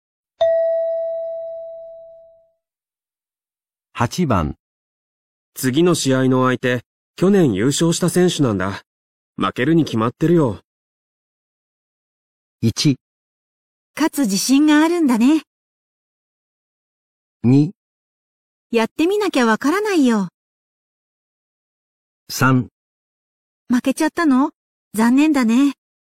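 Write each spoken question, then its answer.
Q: 次の試合の相手、去年優勝した選手なんだ。負けるに決まってるよ。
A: 2: やってみなきゃわからないよ。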